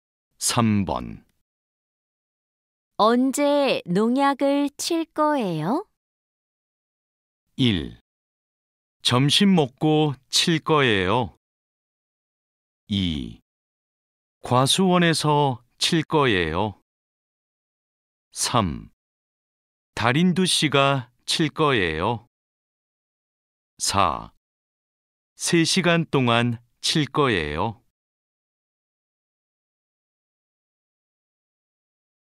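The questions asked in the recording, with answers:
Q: 언제 농약을 칠 거예요?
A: 1: 점심 먹고 칠 거예요.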